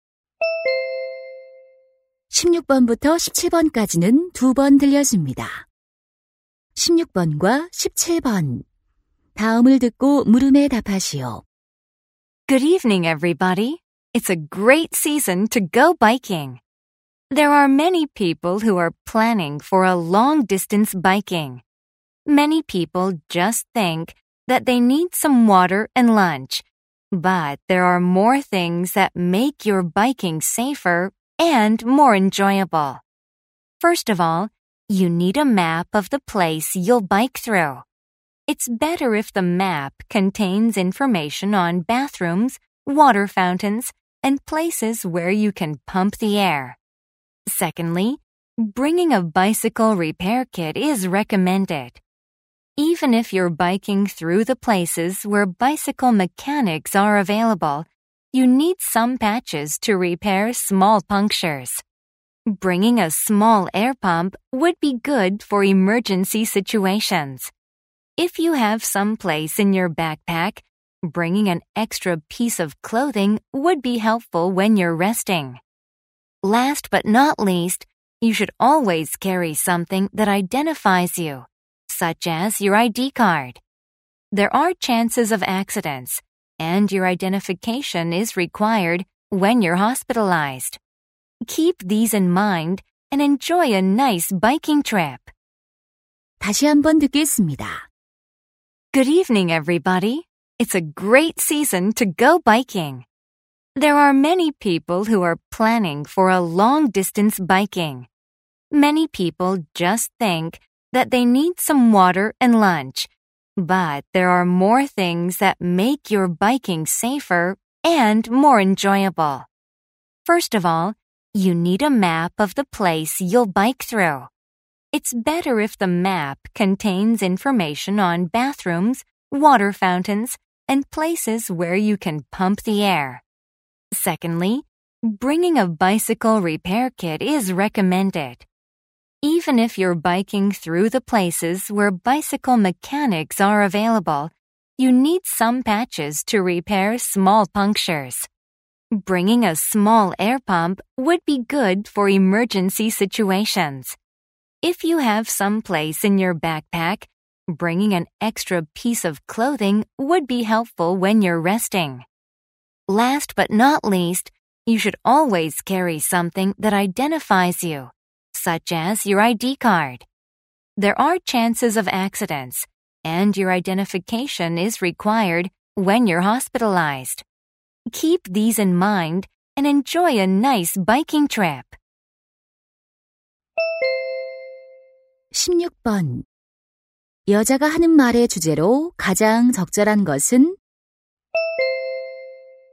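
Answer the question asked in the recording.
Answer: 장거리 자전거 여행 시 챙겨야 할 물건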